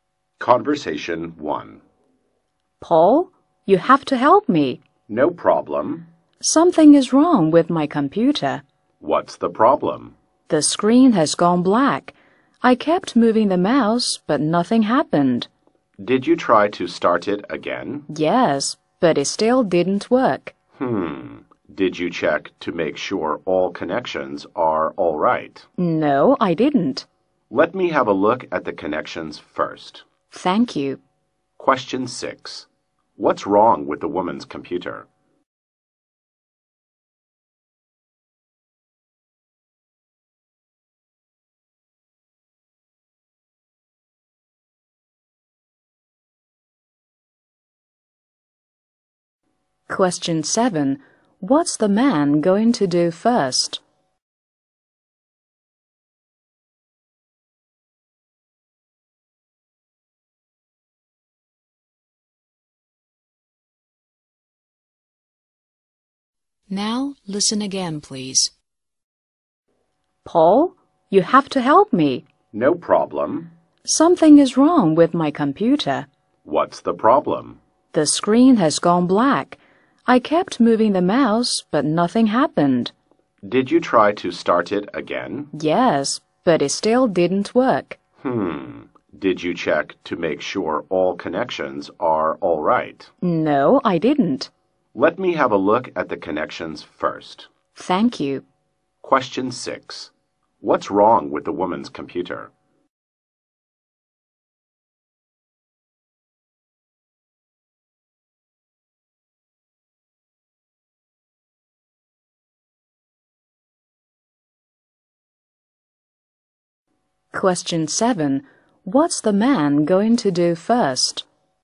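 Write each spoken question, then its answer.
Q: What's wrong with the woman's computer?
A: The screen has gone black

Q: What's the man going to do first?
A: Check the connections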